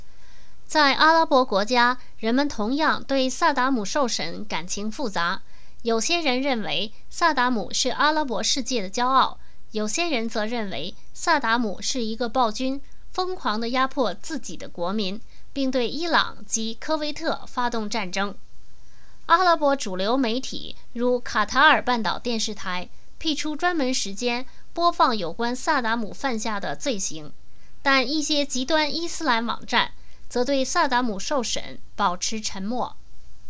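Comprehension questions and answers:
Please answer the following questions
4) 阿拉伯国家的人民如何评价萨达姆?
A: 感情复杂:有些人认为他是阿拉伯世界的骄傲,有些人认为他是压迫国民、对伊朗和科威特发动战争的暴君。

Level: 3rd Year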